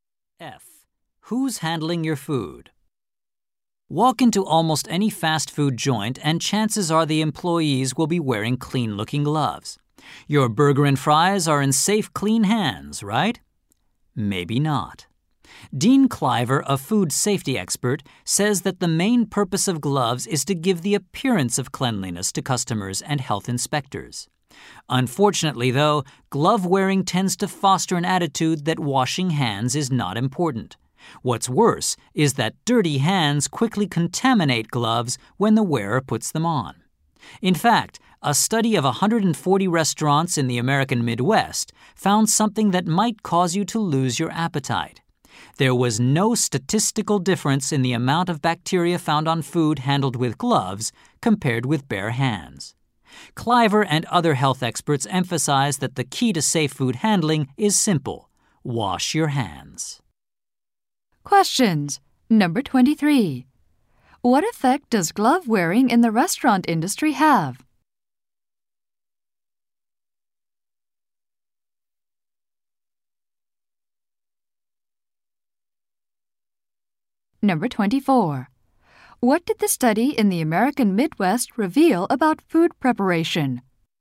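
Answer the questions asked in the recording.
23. Workers think hand washing is less important
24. No difference in bacteria between gloved and bare hands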